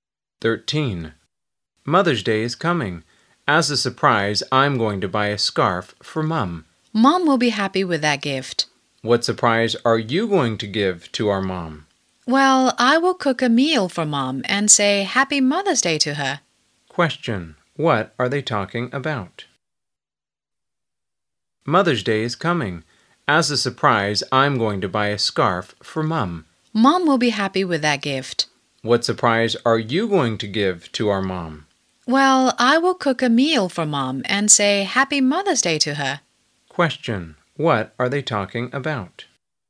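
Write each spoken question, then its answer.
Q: What are they talking about?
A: Surprises/gifts for Mum on Mother's Day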